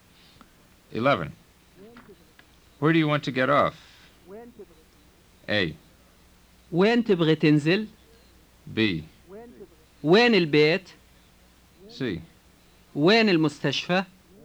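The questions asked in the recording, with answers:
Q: Where do you want to get off?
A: A: وين تبغى تنزل؟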